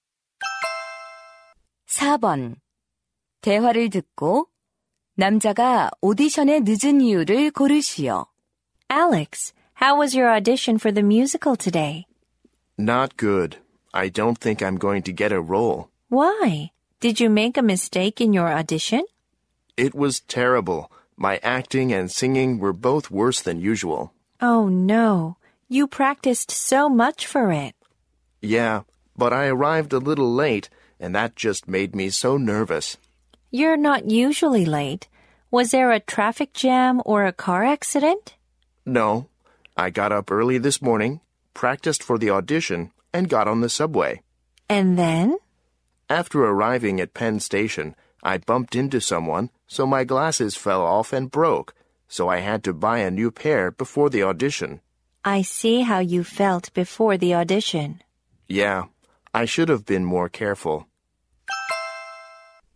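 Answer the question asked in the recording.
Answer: 안경이 깨져서 새로 사야 했기 때문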